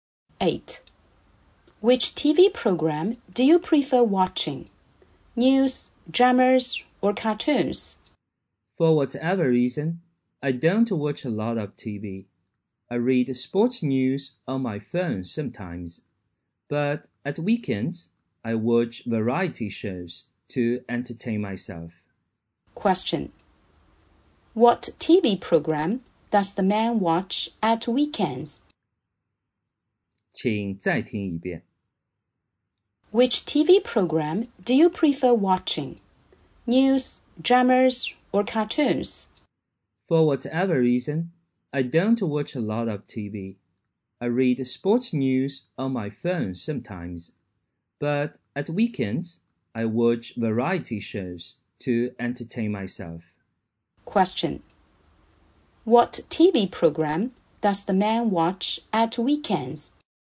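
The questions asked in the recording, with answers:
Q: What TV program does the man watch at weekends?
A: Variety shows.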